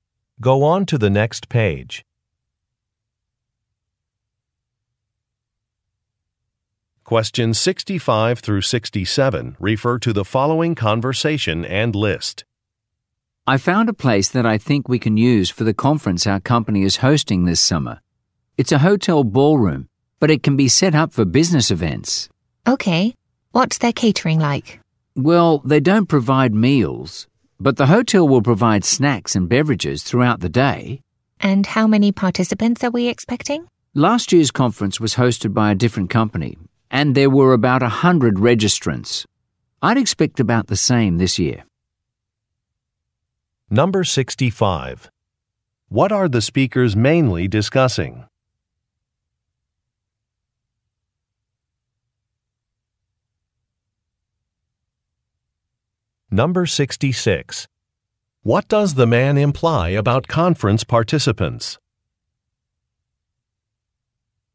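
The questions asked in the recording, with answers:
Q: What are the speakers mainly discussing?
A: A venue for a conference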